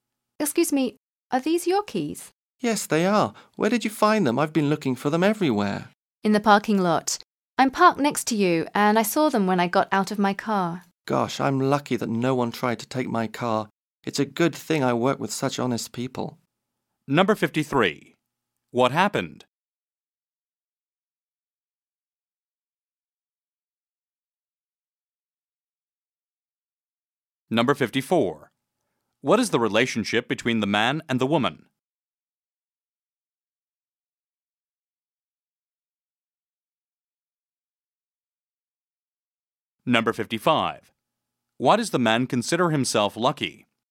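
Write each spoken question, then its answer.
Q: What happened?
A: The man lost his keys and the woman found them in the parking lot

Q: What is the relationship between the man and the woman?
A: Co-workers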